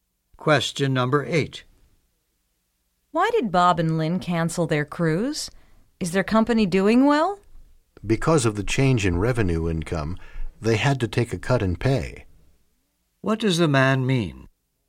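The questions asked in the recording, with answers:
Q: What does the man mean?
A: They canceled because their pay was cut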